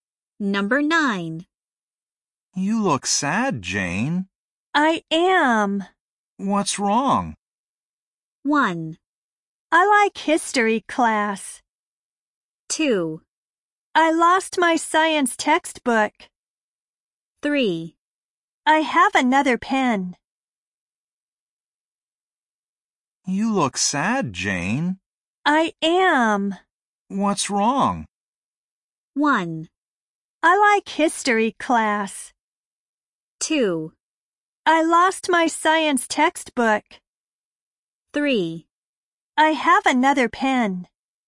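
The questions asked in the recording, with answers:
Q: What's wrong?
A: 2: I lost my science textbook.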